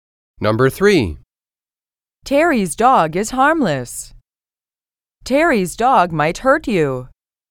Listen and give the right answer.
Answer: Different is the correct answer.